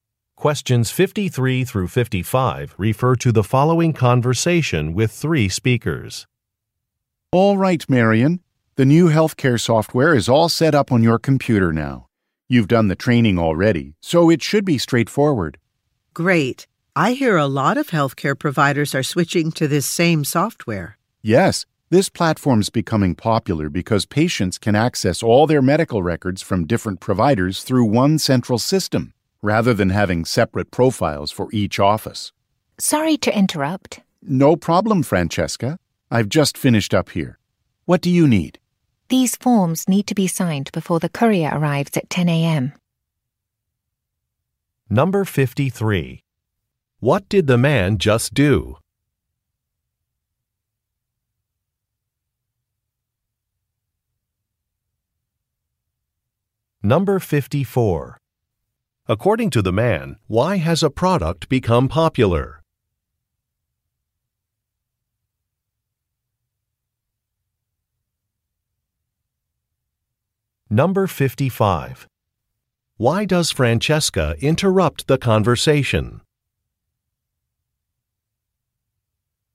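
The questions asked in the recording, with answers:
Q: What did the man just do?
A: Set up software on a computer

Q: According to the man, why has a product become popular?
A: Patients can access all records through one central system

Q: Why does Francesca interrupt the conversation?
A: Forms need to be signed before the courier arrives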